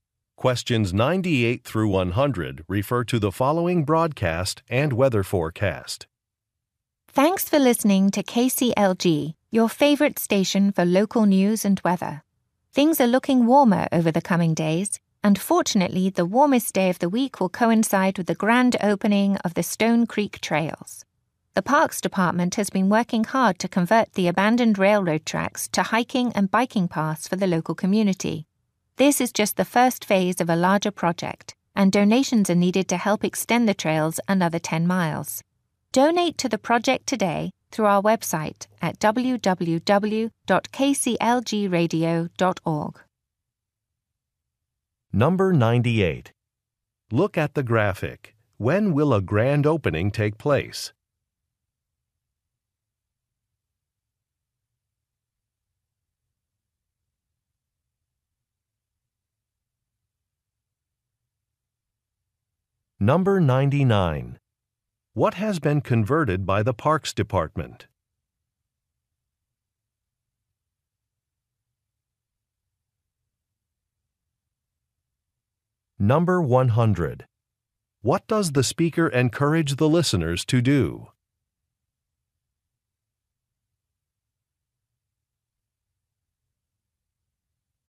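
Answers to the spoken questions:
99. Abandoned railroad tracks
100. Donate to the project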